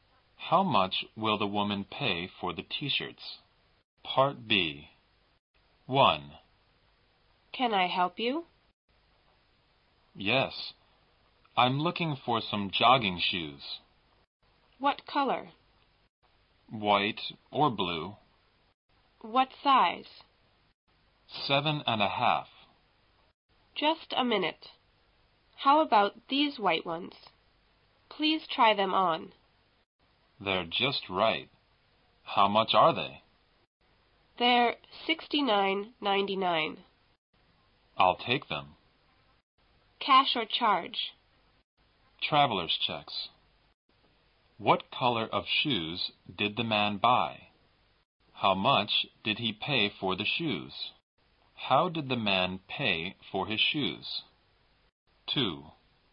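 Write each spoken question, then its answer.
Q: What color of shoes did the man buy?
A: White

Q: How much did he pay for the shoes?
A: $69.99

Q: How did the man pay for his shoes?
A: With traveler's checks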